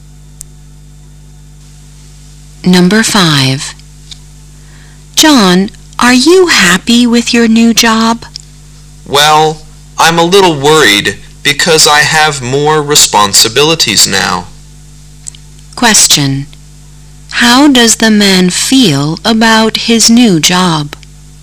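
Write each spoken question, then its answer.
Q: How does the man feel about his new job?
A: A little worried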